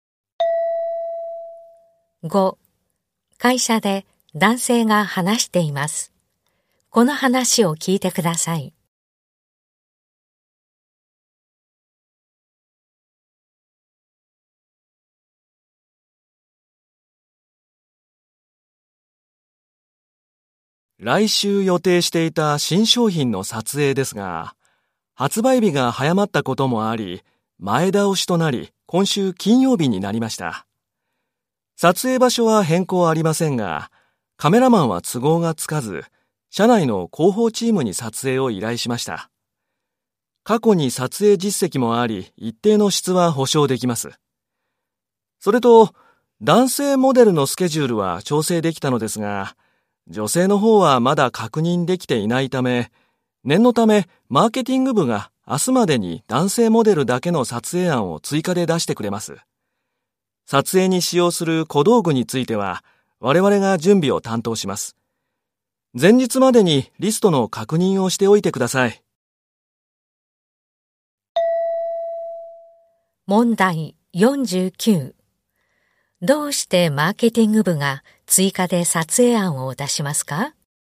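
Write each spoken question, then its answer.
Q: どうしてマーケティング部が追加で撮影案を出しますか?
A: 女性モデルのスケジュールがまだ確認できていないから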